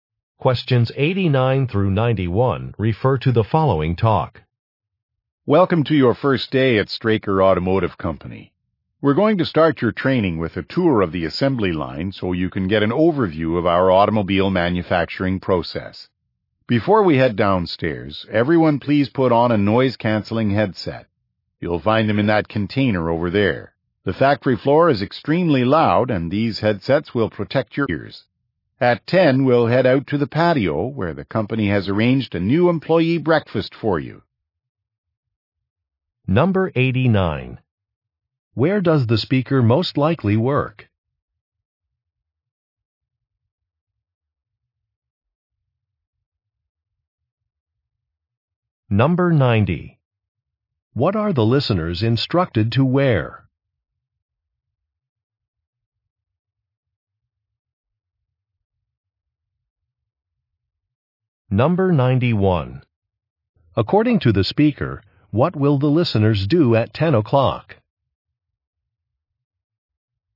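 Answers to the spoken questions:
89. At an automobile factory
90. Noise-canceling headsets
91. Have breakfast on the patio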